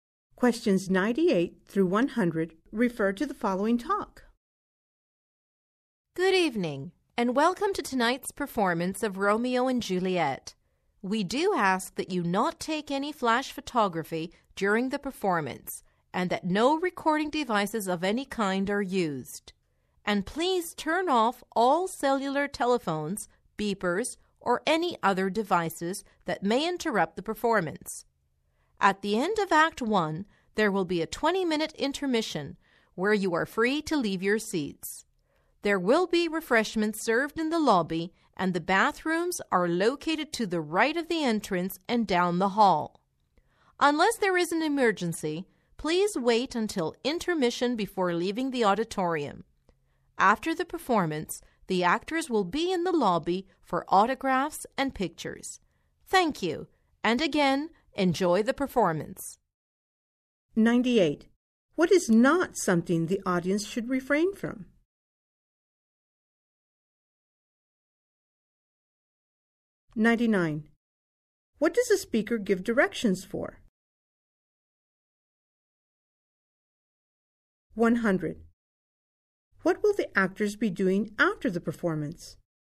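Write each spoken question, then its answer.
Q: What does the speaker give directions for?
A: The bathrooms

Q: What will the actors be doing after the performance?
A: Signing autographs and taking pictures in the lobby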